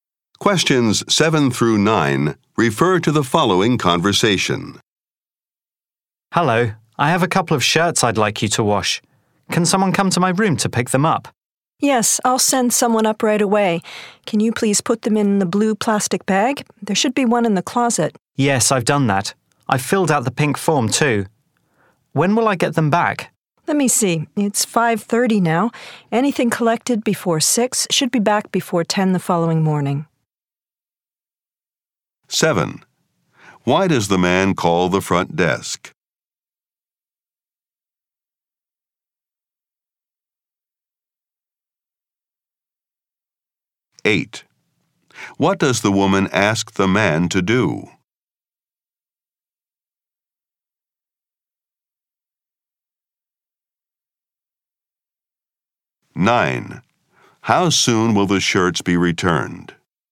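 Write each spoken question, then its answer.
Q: Why does the man call the front desk?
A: To have his shirts washed

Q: What does the woman ask the man to do?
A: Put the shirts in the blue plastic bag

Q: How soon will the shirts be returned?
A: Before 10 the following morning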